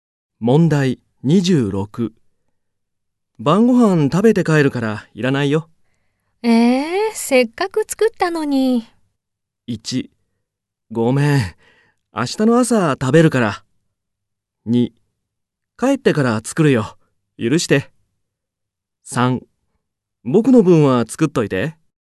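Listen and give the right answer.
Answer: 1: ごめん、明日の朝食べるから。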